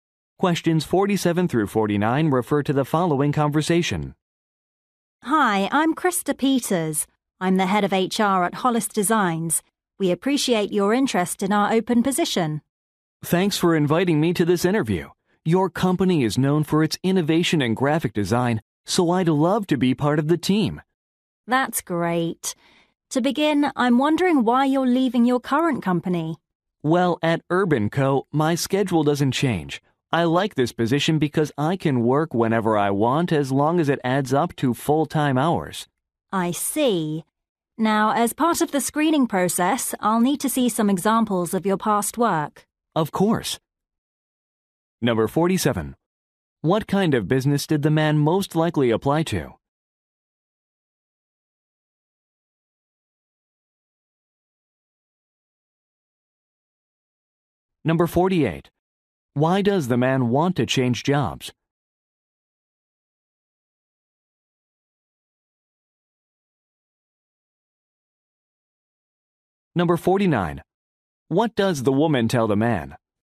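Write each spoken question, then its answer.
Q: What kind of business did the man most likely apply to?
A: A graphic design company

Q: Why does the man want to change jobs?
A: He wants a flexible schedule

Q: What does the woman tell the man?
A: She needs to see examples of his past work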